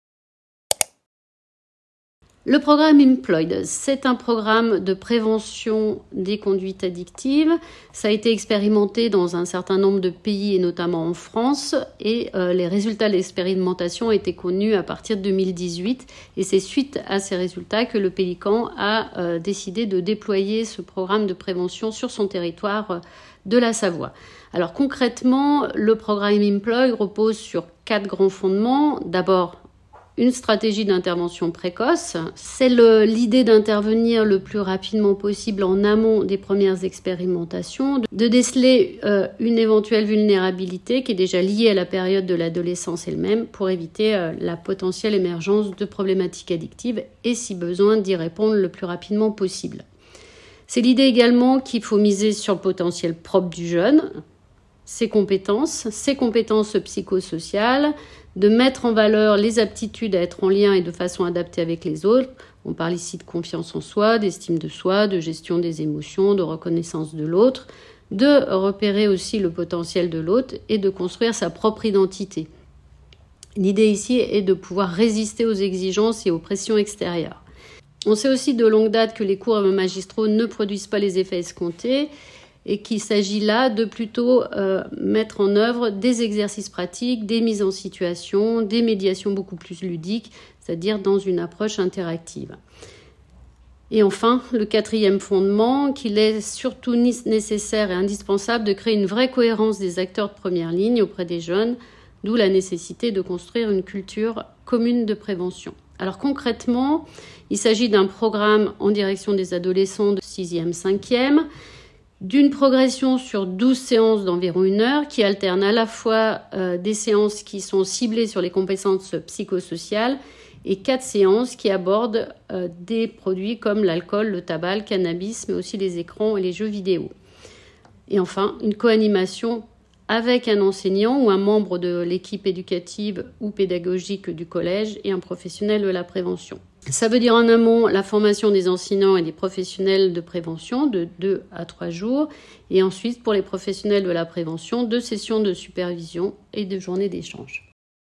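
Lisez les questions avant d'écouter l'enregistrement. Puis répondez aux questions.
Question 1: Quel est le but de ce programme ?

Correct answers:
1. La prévention des conduites addictives chez les adolescents.

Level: Niveau intermédiaire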